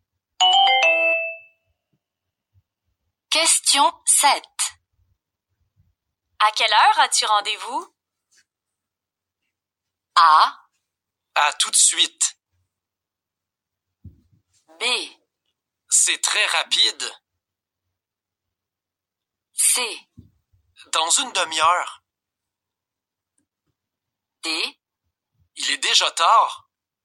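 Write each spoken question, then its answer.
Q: À quelle heure as-tu rendez-vous?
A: C: Dans une demi-heure.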